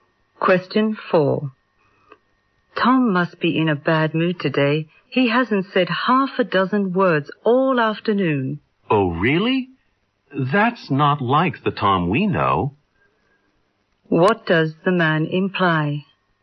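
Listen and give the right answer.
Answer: Tom is usually talkative.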